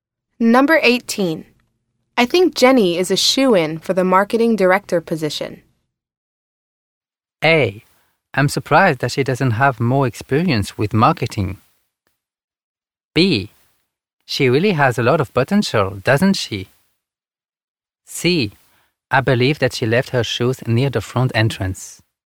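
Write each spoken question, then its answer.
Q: I think Jenny is a shoo-in for the marketing director position.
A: B: She really has a lot of potential, doesn't she?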